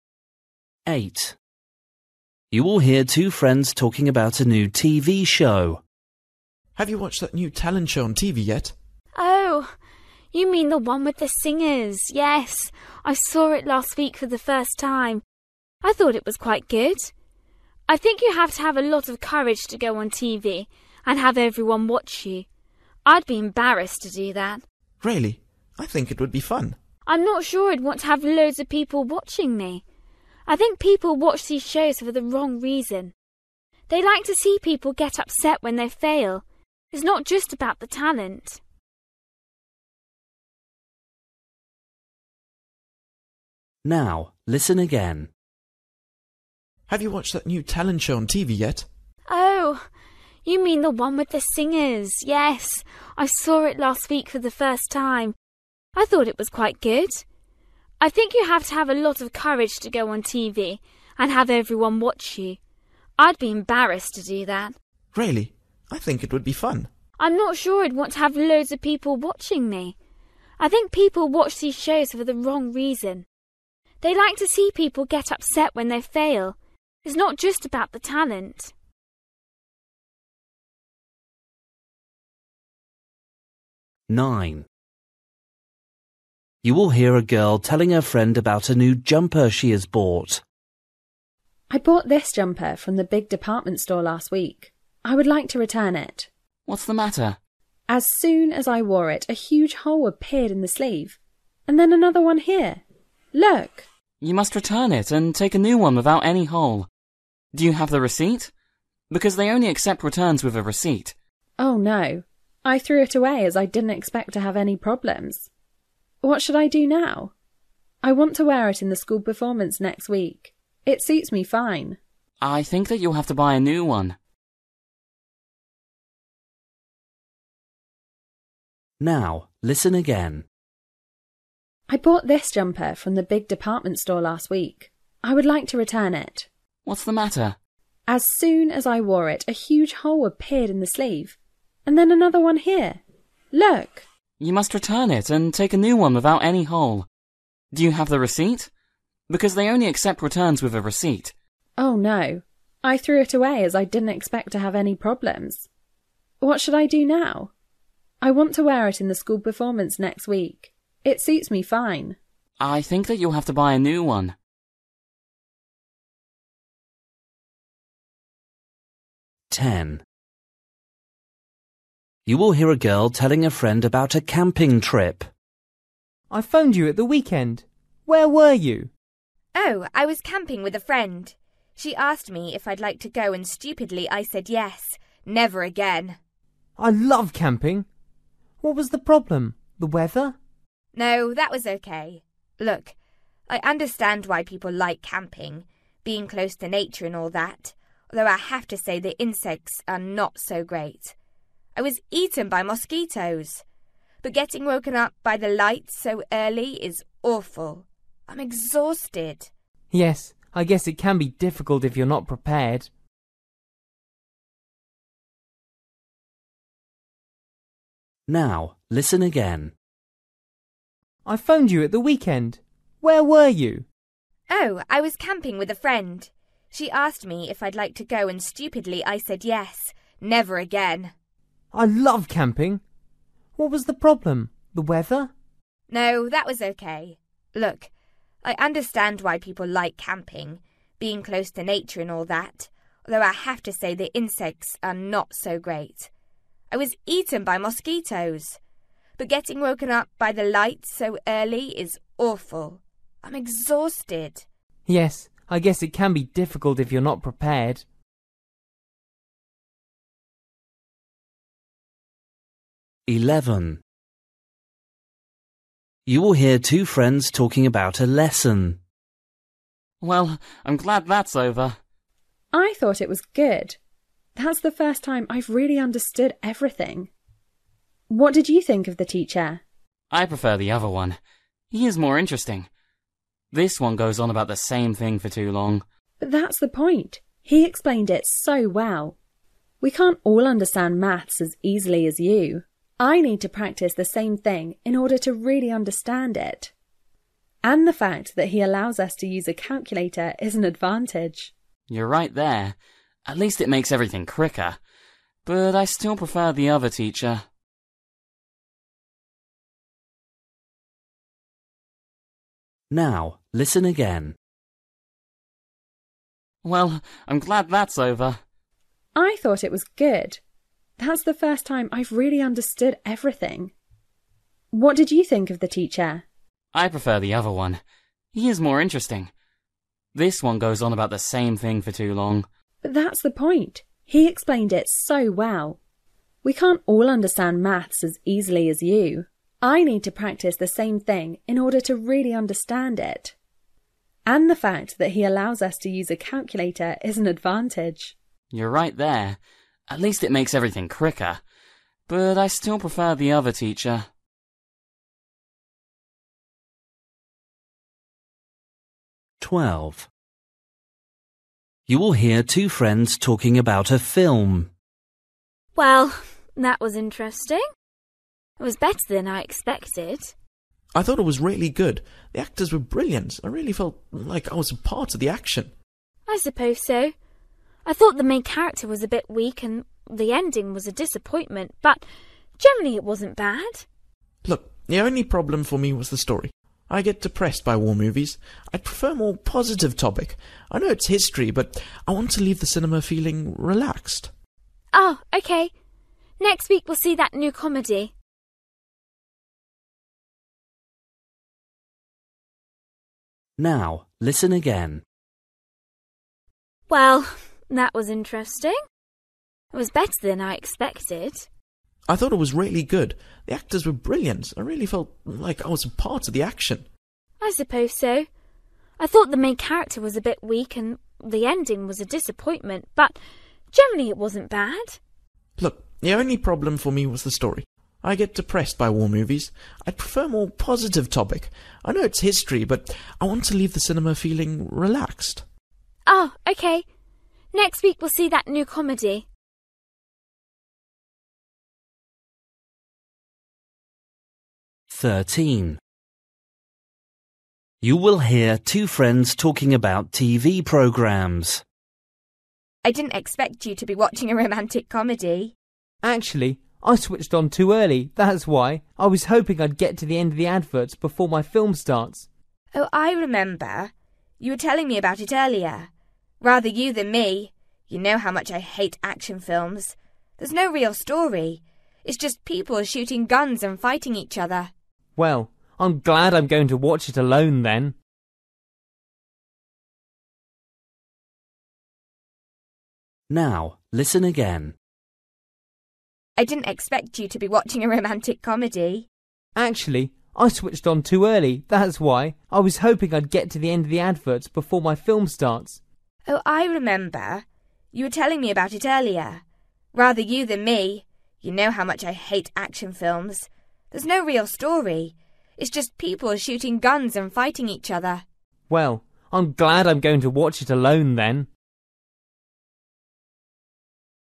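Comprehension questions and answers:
For each question, choose the correct answer.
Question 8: You will hear two friends talking about a new TV show. Why does the girl say that she wouldn't take part in it?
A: She would be embarrassed to be watched by everyone on TV.

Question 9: You will hear a girl telling her friend about a new jumper she has bought. What's the problem about her jumper?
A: Holes appeared in it, and she can't return it because she threw away the receipt.

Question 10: You will hear a girl telling a friend about a camping trip. What did she dislike most?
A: Being woken up so early by the light.

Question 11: You will hear two friends talking about a lesson. What do they agree about?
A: Being allowed to use a calculator is an advantage.

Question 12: You will hear two friends talking about a film. What was the boy's complaint about it?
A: The story: war films depress him.

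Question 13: You will hear two friends talking about TV programmes. What is the boy watching at the moment?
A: The end of a romantic comedy and the adverts, while he waits for his action film.

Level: Luyện nghe trình độ B1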